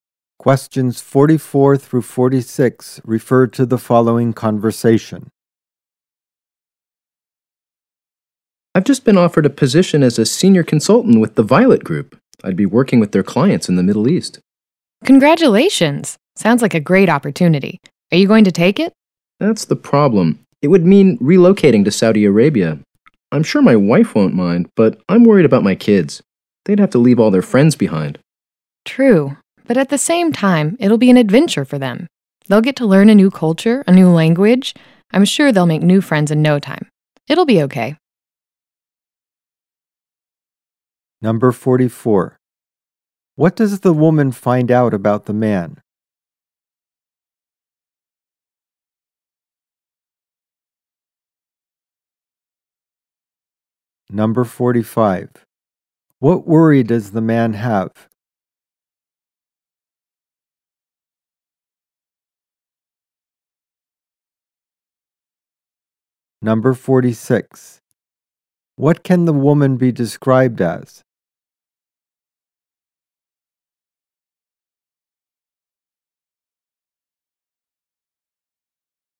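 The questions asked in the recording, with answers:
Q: What does the woman find out about the man?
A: He has been offered a senior consultant position with the Violet Group

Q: What worry does the man have?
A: His kids would have to leave their friends behind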